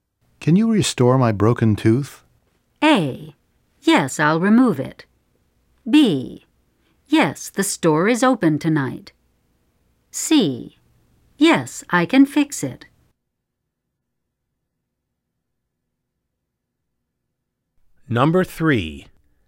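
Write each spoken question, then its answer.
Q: Can you restore my broken tooth?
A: C: Yes, I can fix it.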